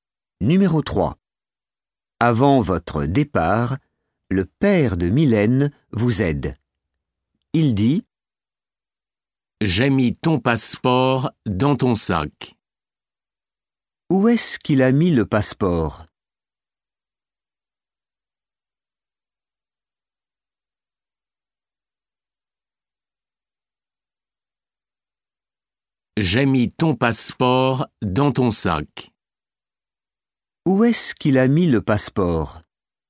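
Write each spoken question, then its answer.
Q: Où est-ce qu'il a mis le passeport?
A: Dans ton sac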